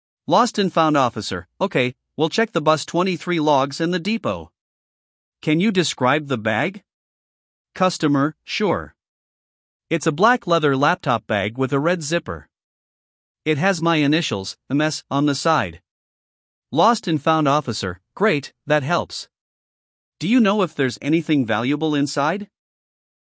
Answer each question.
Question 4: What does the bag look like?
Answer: Black leather with red zipper

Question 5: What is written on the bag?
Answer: M.S. initials

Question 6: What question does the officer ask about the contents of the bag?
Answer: Whether anything valuable is inside

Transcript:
Lost and Found Officer: Okay, we'll check the Bus 23 logs and the depot. Can you describe the bag?
Customer: Sure. It's a black leather laptop bag with a red zipper. It has my initials, M.S., on the side.
Lost and Found Officer: Great, that helps. Do you know if there's anything valuable inside?